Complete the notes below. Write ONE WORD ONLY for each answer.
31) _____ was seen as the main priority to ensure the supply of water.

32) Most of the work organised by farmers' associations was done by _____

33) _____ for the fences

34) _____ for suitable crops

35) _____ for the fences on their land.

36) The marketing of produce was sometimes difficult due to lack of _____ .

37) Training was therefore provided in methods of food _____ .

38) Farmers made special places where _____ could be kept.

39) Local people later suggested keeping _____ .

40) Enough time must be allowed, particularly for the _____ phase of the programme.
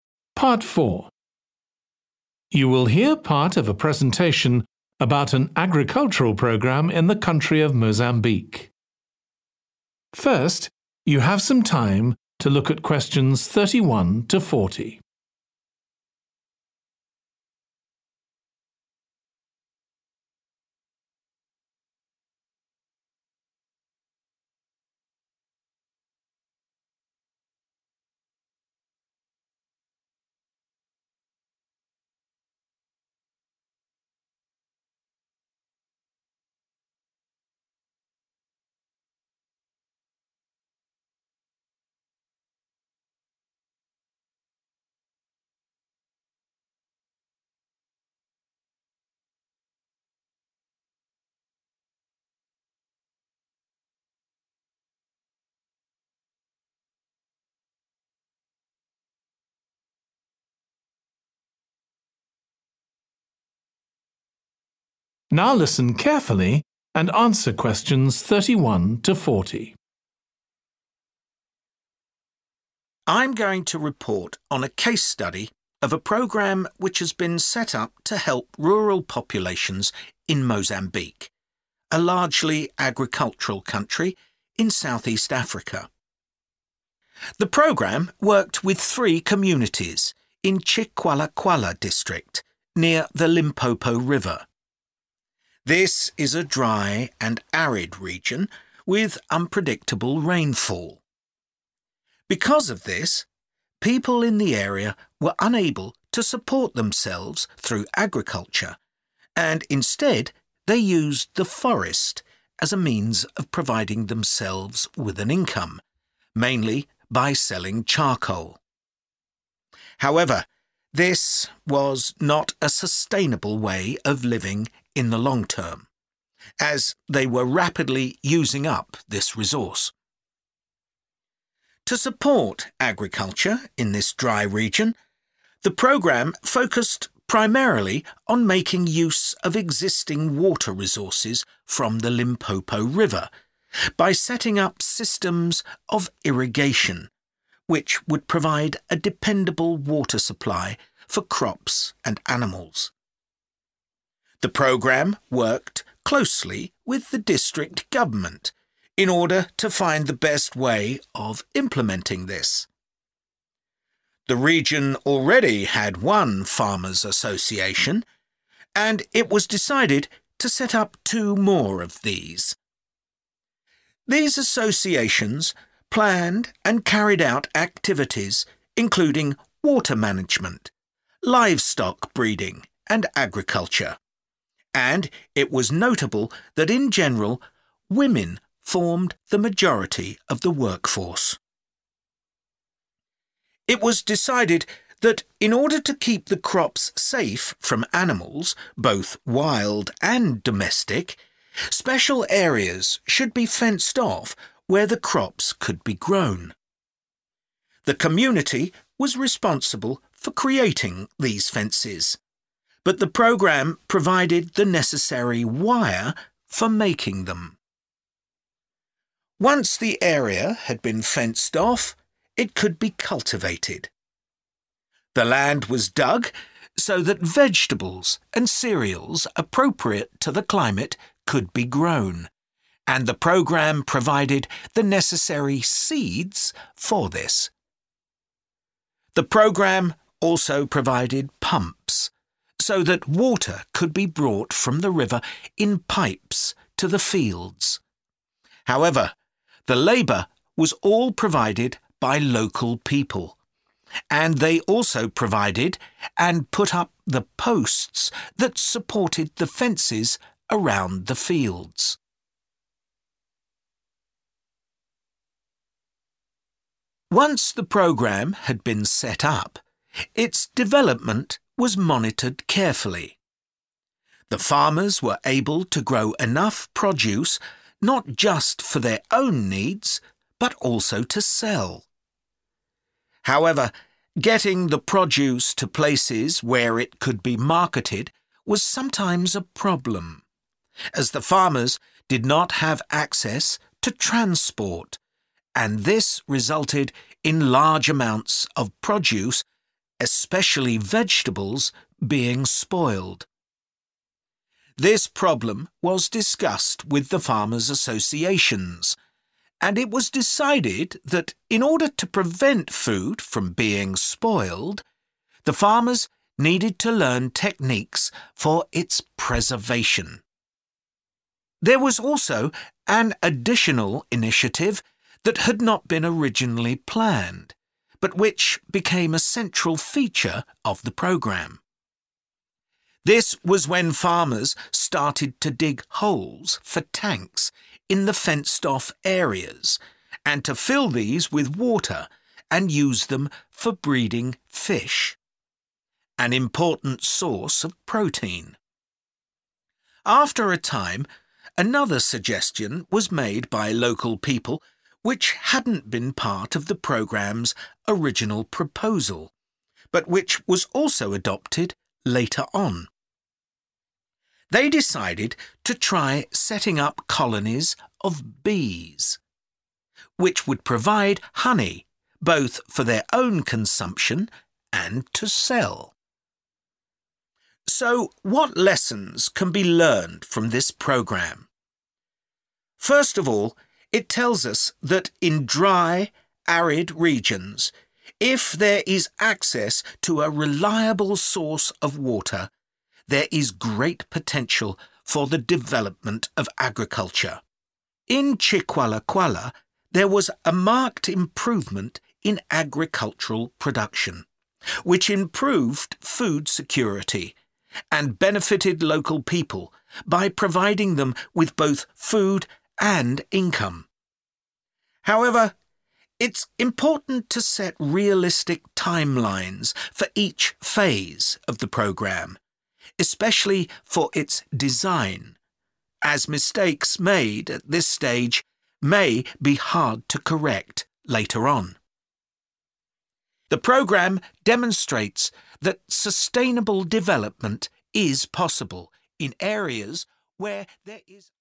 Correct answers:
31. Irrigation
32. women
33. wire / wires
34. seed / seeds
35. posts
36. transport
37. preservation
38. fish / fishes
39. bees
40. design

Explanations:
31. The transcript talks about how the program focused on using water from the Limpopo River to help with agriculture. Answer Explanation: The answer, 'Irrigation,' means providing water to crops. In this context, irrigation was crucial for ensuring a steady supply of water for agricultural purposes. Reason For Correctness: The correct answer is based on the information in the excerpt that mentions setting up systems of irrigation to utilize water from the Limpopo River for agricultural activities. This confirms that irrigation was indeed a key aspect of the agricultural program in Mozambique.
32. The transcript is saying that the majority of the workers were women. Answer Explanation: The answer refers to females. Reason For Correctness: The correct answer matches with the information provided in the excerpt that women were the main part of the workforce, showing that they played a significant role in the agricultural programme in Mozambique.
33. The transcript says that the community made fences for the agricultural programme, and the programme provided the necessary wire for making those fences. Answer Explanation: The answer suggests that 'wire' or 'wires' were provided for making the fences. Reason For Correctness: The correct answer aligns with the information in the excerpt where it states that the wire was provided for creating the fences. It matches the context of the community being responsible for fence creation and the programme providing the necessary materials.
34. The transcript mentions that the program provided the necessary seeds for something. Answer Explanation: The answer refers to the word 'seed,' which is the singular form, and 'seeds,' which is the plural form of the same concept. Reason For Correctness: The correct answer matches the context of the excerpt where seeds were provided as part of the agricultural program, showing that the program focused on ensuring the availability of seeds for the farmers' agricultural activities.
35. The transcript mentions that the farmers provided and placed the support beams used for the fences around the fields. Answer Explanation: The answer 'posts' refers to the support beams or poles used for the fences. Reason For Correctness: The correct answer aligns with the excerpt as 'posts' accurately describes the support structures mentioned, which are essential for building the fences around the fields as part of the agricultural program in Mozambique.
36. The transcript talks about farmers not having access to transport. Answer Explanation: The answer 'transport' refers to the means of moving people or goods from one place to another. Reason For Correctness: The correct answer 'transport' fits the context as it explains the challenge faced by farmers in moving themselves and their produce to market, which was a difficulty highlighted in the excerpt.
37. The transcript means that the farmers didn't know how to keep their food from going bad. Answer Explanation: The answer 'preservation' means to keep something safe from spoiling or decaying. Reason For Correctness: The correct answer 'preservation' is right because the excerpt says farmers needed to learn techniques for 'preservation'. This means they needed to learn ways to keep their food from spoiling, which is the meaning of 'preservation'.
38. The transcript talks about creating areas filled with water to breed fish. Answer Explanation: The answer refers to 'fish' or 'fishes,' which are animals that live in water and breathe using gills. Reason For Correctness: The correct answer matches the context of the excerpt, which mentions filling areas with water to breed fish, indicating the importance of this activity in the agricultural program in Mozambique.
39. The transcript talks about a decision made to start colonies of bees. Answer Explanation: The answer 'bees' refers to the insects that were chosen to be part of the agricultural program. Reason For Correctness: The correct answer is bees because the excerpt mentions setting up colonies of bees as part of the agricultural program in Mozambique. Bees play a crucial role in pollination and can help increase crop yields, making them an important aspect of the program's organization.
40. The transcript emphasizes the importance of setting realistic timelines, especially for planning the layout or structure of the agricultural programme. Answer Explanation: The answer 'design' refers to the layout or structure of the programme. Reason For Correctness: The correct answer aligns with the idea of setting realistic timelines for the 'design' phase mentioned in the excerpt. Designing the programme involves planning how it will be organized and implemented, which is crucial for its success.

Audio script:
I'm going to report on a case study of a programme which has been set up to help rural populations in Mozambique, a largely agricultural country in South-East Africa.
The programme worked with three communities in Chicualacuala district, near the Limpopo River. This is a dry and arid region, with unpredictable rainfall. Because of this, people in the area were unable to support themselves through agriculture and instead they used the forest as a means of providing themselves with an income, mainly by selling charcoal. However, this was not a sustainable way of living in the long term, as they were rapidly using up this resource.
To support agriculture in this dry region, the programme focused primarily on making use of existing water resources from the Limpopo River by setting up systems of irrigation, which would provide a dependable water supply for crops and animals. The programme worked closely with the district government in order to find the best way of implementing this. The region already had one farmers' association, and it was decided to set up two more of these. These associations planned and carried out activities including water management, livestock breeding and agriculture, and it was notable that in general, women formed the majority of the workforce.
It was decided that in order to keep the crops safe from animals, both wild and domestic, special areas should be fenced off where the crops could be grown. The community was responsible for creating these fences, but the programme provided the necessary wire for making them.
Once the area had been fenced off, it could be cultivated. The land was dug, so that vegetables and cereals appropriate to the climate could be grown, and the programme provided the necessary seeds for this. The programme also provided pumps so that water could be brought from the river in pipes to the fields. However, the labour was all provided by local people, and they also provided and put up the posts that supported the fences around the fields.
Once the programme had been set up, its development was monitored carefully. The farmers were able to grow enough produce not just for their own needs, but also to sell. However, getting the produce to places where it could be marketed was sometimes a problem, as the farmers did not have access to transport, and this resulted in large amounts of produce, especially vegetables, being spoiled. This problem was discussed with the farmers' associations and it was decided that in order to prevent food from being spoiled, the farmers needed to learn techniques for its preservation.
There was also an additional initiative that had not been originally planned, but which became a central feature of the programme. This was when farmers started to dig holes for tanks in the fenced-off areas and to fill these with water and use them for breeding fish – an important source of protein. After a time, another suggestion was made by local people which hadn't been part of the programme's original proposal, but which was also adopted later on. They decided to try setting up colonies of bees, which would provide honey both for their own consumption and to sell.
So what lessons can be learned from this programme? First of all, it tells us that in dry, arid regions, if there is access to a reliable source of water, there is great potential for the development of agriculture. In Chicualacuala, there was a marked improvement in agricultural production, which improved food security and benefited local people by providing them with both food and income. However, it's important to set realistic timelines for each phase of the programme, especially for its design, as mistakes made at this stage may be hard to correct later on.
The programme demonstrates that sustainable development is possible in areas where ...